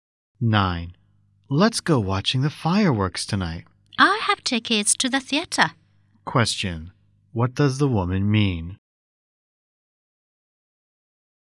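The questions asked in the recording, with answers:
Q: What does the woman mean?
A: She can't go to the fireworks because she is going to the theater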